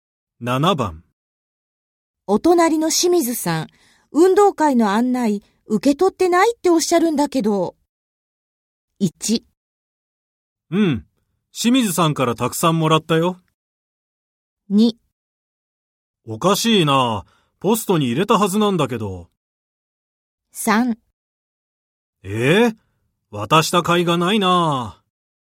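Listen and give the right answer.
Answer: 2: おかしいな。ポストに入れたはずなんだけど。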